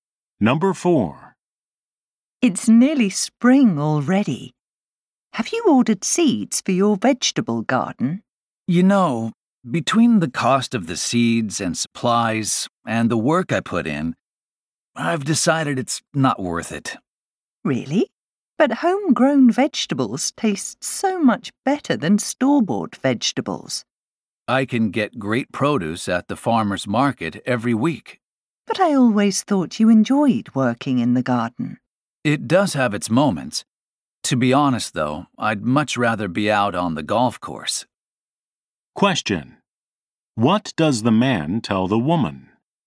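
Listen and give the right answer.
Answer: He has decided a vegetable garden isn't worth the cost and work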